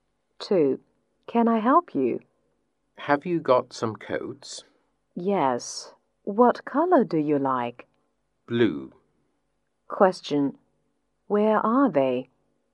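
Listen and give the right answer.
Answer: In a clothes shop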